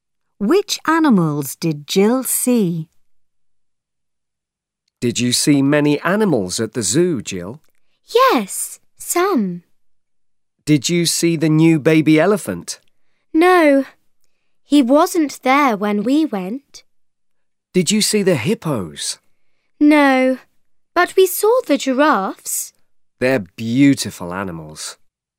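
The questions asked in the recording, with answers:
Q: Which animals did Jill see?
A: giraffes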